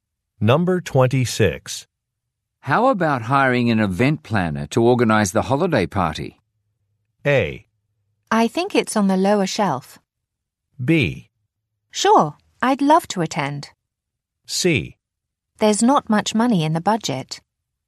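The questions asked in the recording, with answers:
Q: How about hiring an event planner to organize the holiday party?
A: C: There's not much money in the budget.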